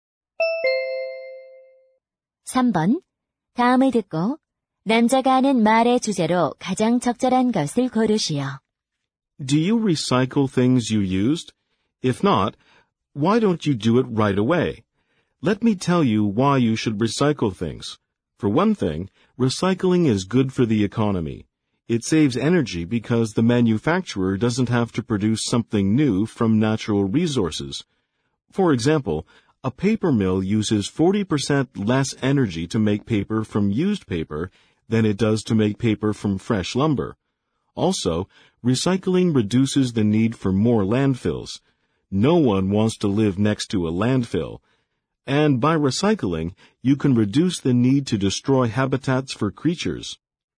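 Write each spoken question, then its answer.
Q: 다음을 듣고 남자가 하는 말의 주제로 가장 적절한 것을 고르시오.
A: 재활용을 해야 하는 이유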